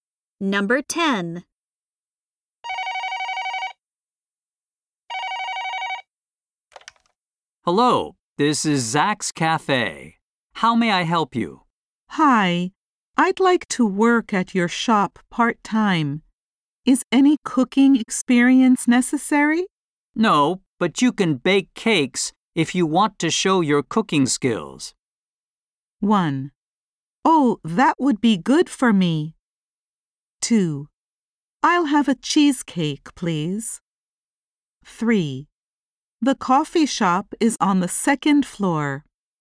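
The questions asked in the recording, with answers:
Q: No, but you can bake cakes if you want to show your cooking skills.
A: 1: Oh, that would be good for me.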